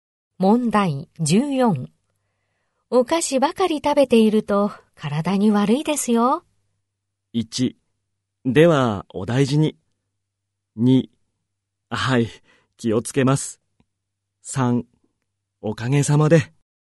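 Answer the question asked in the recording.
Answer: 2: はい、気をつけます。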